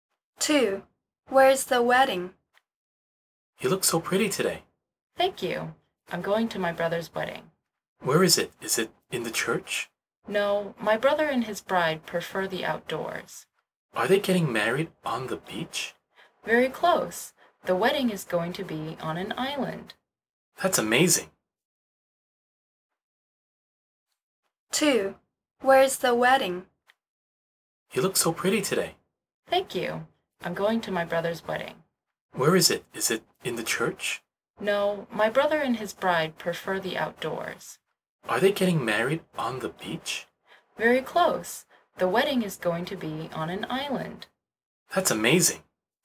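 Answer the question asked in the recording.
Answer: on an island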